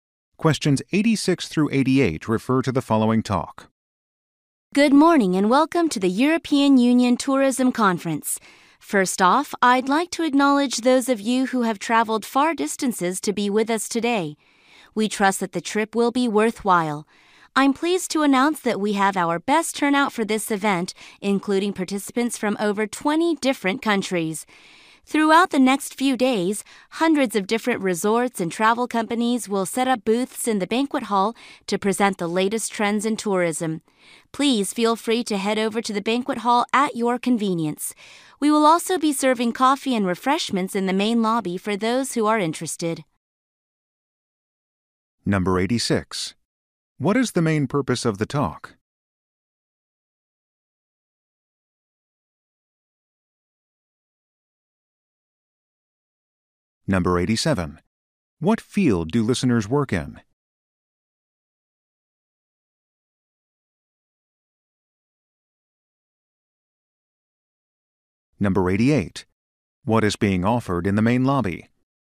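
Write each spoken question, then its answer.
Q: What is the main purpose of the talk?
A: To welcome people to a conference

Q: What field do listeners work in?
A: Tourism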